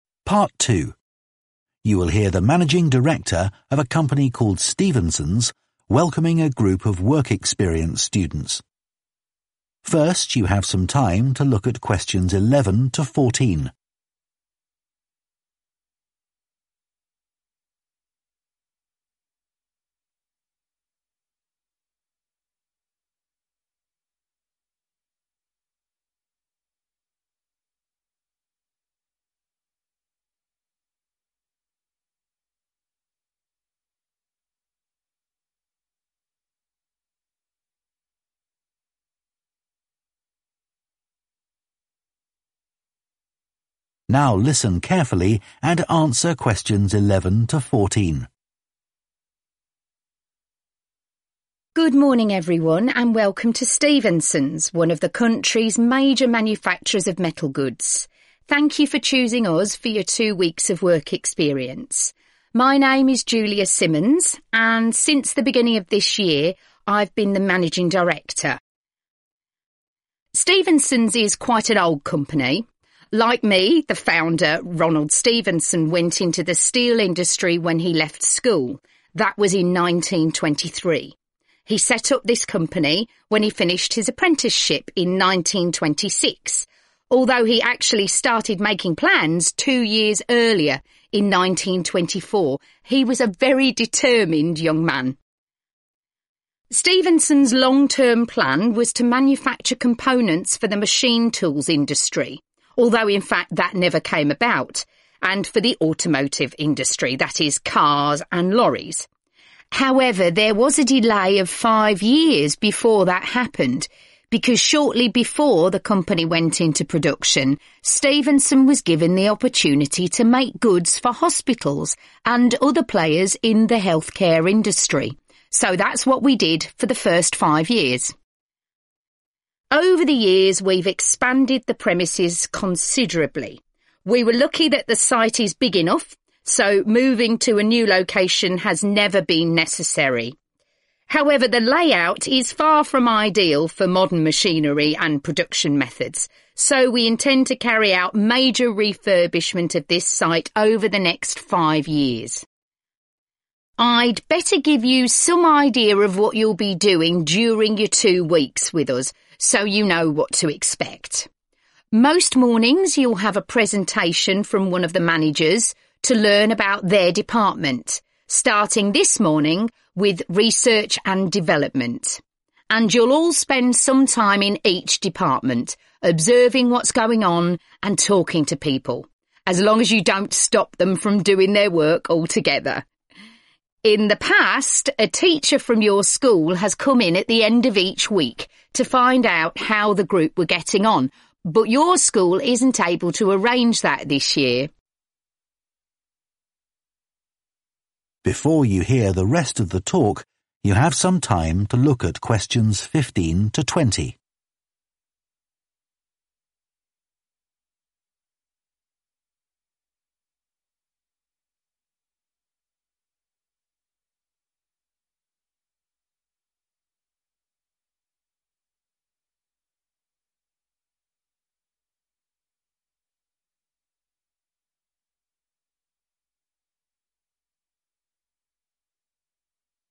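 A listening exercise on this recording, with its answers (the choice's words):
Choose the correct letter, A, B or C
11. Stevenson's was founded in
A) 1923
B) 1924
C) 1926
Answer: 1926

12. Originally, Stevenson's manufactured goods for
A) the healthcare industry.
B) the automotive industry.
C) the machine tools industry.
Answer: the healthcare industry.

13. What does the speaker say about the company premises?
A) The company has recently moved.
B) The company has no plans to move.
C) The company is going to move shortly.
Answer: The company has no plans to move.

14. The program for the work experience group includes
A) time to do research.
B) meetings with a teacher.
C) talks by staff.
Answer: talks by staff.

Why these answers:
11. Ông thành lập công ty này khi hoàn thành khóa học việc của mình vào năm 1926 ⇒ đáp án B
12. Stevenson đã có cơ hội sản xuất hàng hóa cho các bệnh viện và những người chơi khác trong ngành chăm sóc sức khỏe ⇒ đáp án A
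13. chúng tôi may mắn rằng địa điểm làm việc đủ lớn, vì vậy việc di chuyển đến một địa điểm mới chưa bao giờ là cần thiết = Công ty không có kế hoạch dời đi ⇒ đáp án B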